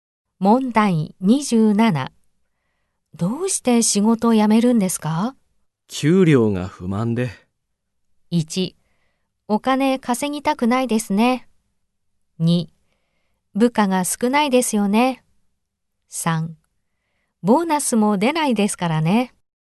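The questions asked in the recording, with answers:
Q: どうして仕事を辞めるんですか?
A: 3: ボーナスも出ないですからね。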